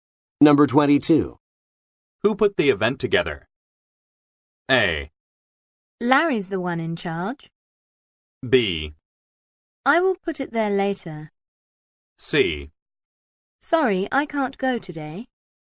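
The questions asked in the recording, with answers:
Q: Who put the event together?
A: A: Larry's the one in charge.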